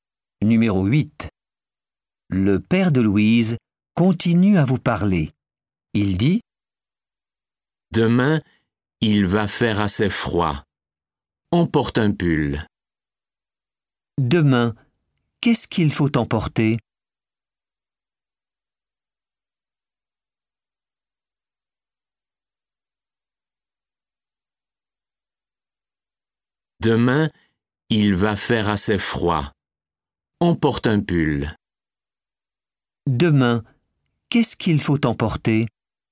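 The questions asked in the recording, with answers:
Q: Demain, qu'est-ce qu'il faut emporter?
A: un pull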